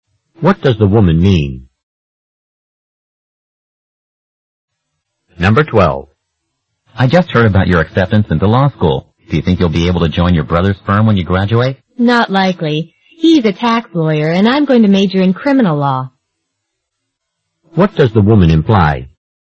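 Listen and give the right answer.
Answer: She probably won't work at her brother's firm because their fields are different.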